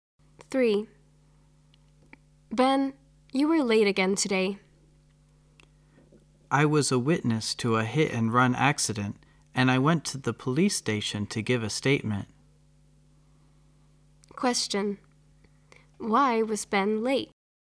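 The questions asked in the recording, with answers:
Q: Why was Ben late?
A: He saw a hit-and-run accident and went to the police station to give a statement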